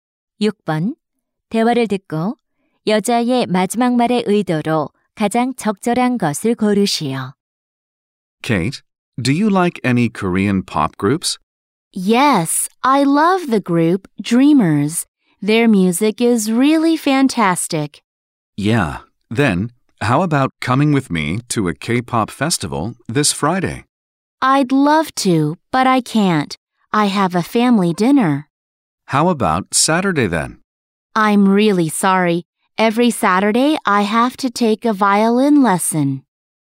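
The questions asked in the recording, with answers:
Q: 대화를 듣고 여자의 마지막 말의 의도로 가장 적절한 것을 고르시오.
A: 거절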